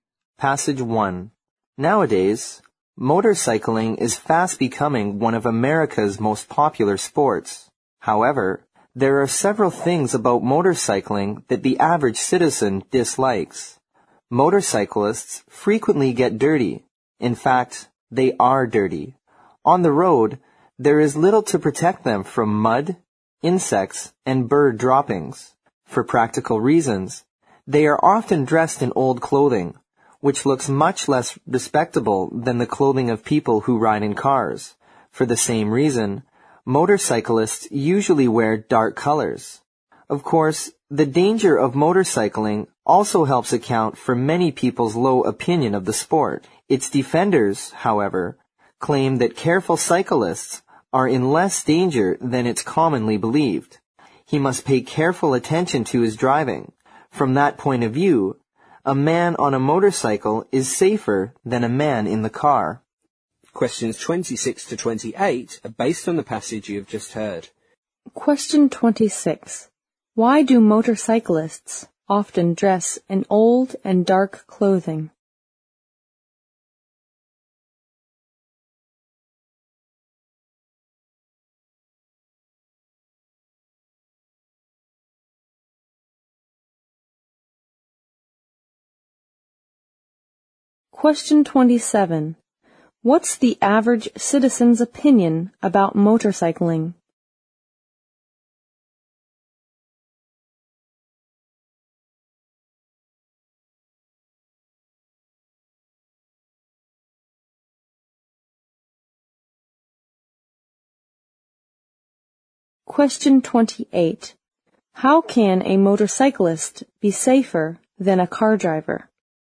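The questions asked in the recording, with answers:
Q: Why do motorcyclists often dress in old and dark clothing?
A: Because they get dirty on the road

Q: What's the average citizen's opinion about motorcycling?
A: It is dirty and dangerous

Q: How can a motorcyclist be safer than a car driver?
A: He must pay careful attention to his driving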